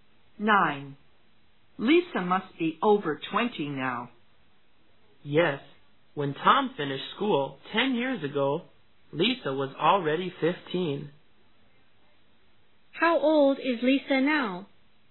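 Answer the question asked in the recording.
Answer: 25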